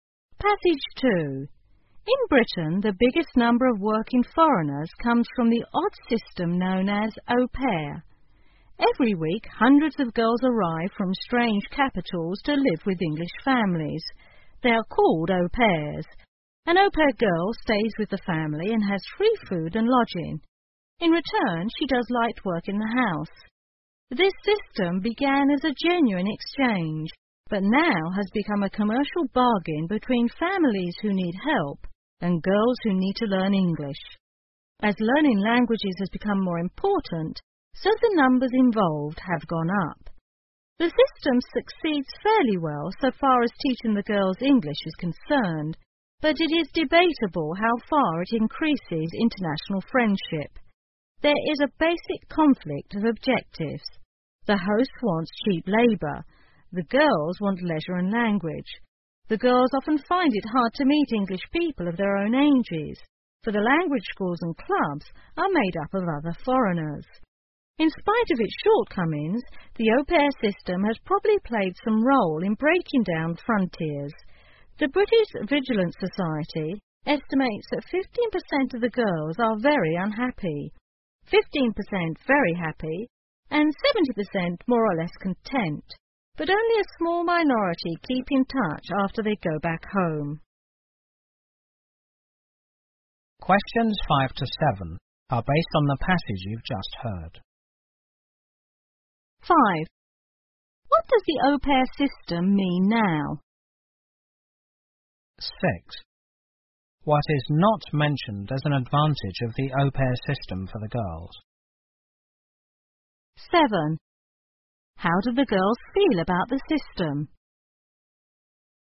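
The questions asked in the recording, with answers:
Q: What does the au pair system mean now?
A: A commercial bargain between families who need help and girls who need to learn English

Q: How do the girls feel about the system?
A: Most are more or less content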